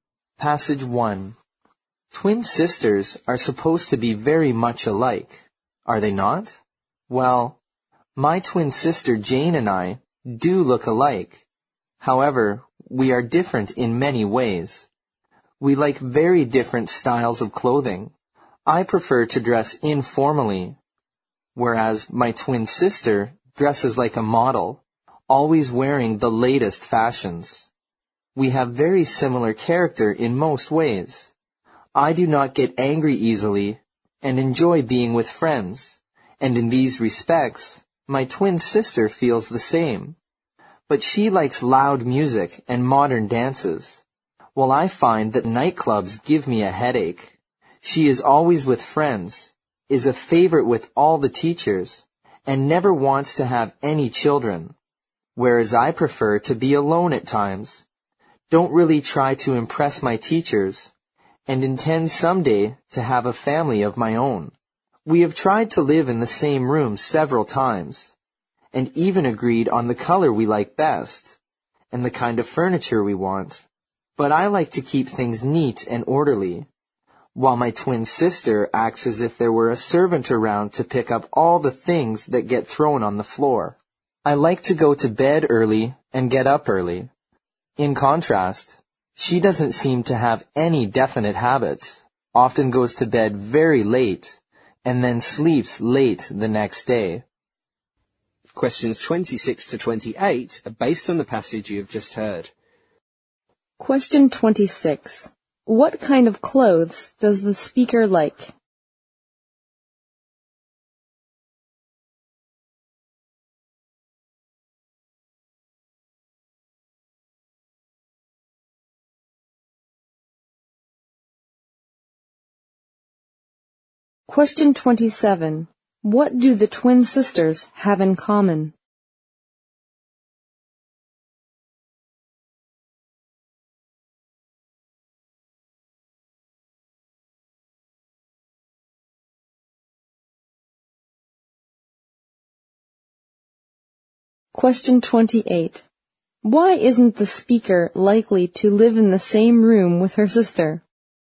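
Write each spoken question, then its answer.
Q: What kind of clothes does the speaker like?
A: Informal clothes

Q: What do the twin sisters have in common?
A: They don't get angry easily and enjoy being with friends.

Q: Why isn't the speaker likely to live in the same room with her sister?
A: Their habits differ: she is neat and orderly, her sister is messy.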